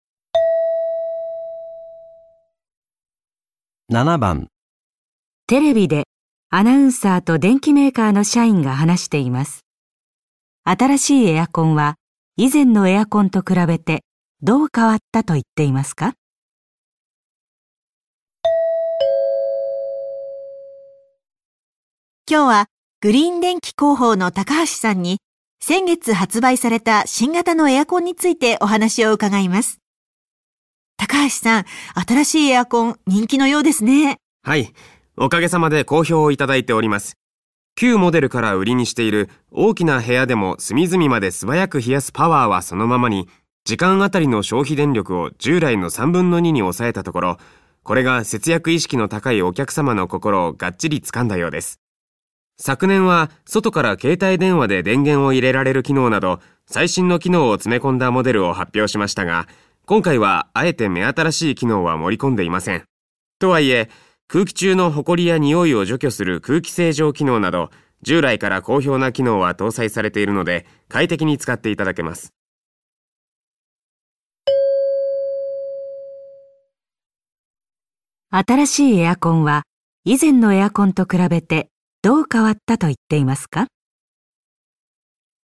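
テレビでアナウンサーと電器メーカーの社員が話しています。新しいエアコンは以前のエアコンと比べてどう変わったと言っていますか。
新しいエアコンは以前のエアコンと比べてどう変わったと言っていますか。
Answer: 時間当たりの消費電力が従来の3分の2に抑えられた

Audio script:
女:今日はグリーン電器広報の高橋さんに先月発売された新型のエアコンについてお話を伺います。高橋さん、新しいエアコン人気のようですね。
男: はい、おかげさまで好評をいただいております。旧モデルから売りにしている大きな部屋でも隅々まで素早く冷やすパワーはそのままに、 時間当たりの消費電力を従来の3分の2に抑えたところ。これが節約意識の高いお客様の心をがっちり掴んだようです。昨年は外から携帯電話 で電源を入れられる機能など最新の機能を詰め込んだモデルを発表しましたが、今回はあえて目新しい機能は盛り込んでいません。とは言え、 空気中のほこりや匂いを除去する空気清浄機能など従来から好評な機能は搭載されているので快適に使っていただけます。

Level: N1级别听力题库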